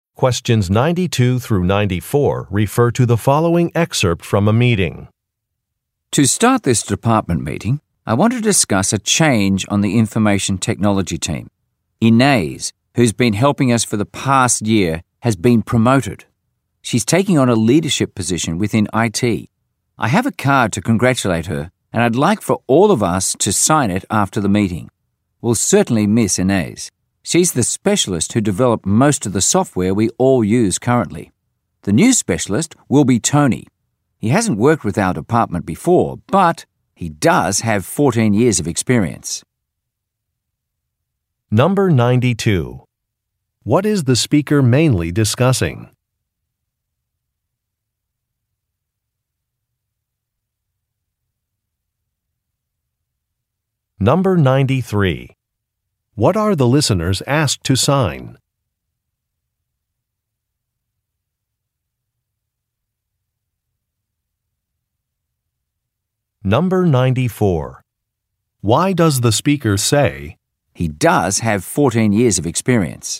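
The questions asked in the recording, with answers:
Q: What is the speaker mainly discussing?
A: A staff change on the IT team: Inez's promotion

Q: What are the listeners asked to sign?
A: A congratulations card for Inez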